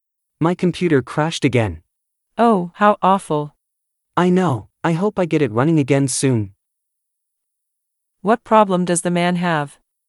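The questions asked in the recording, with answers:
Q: What problem does the man have?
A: His computer crashed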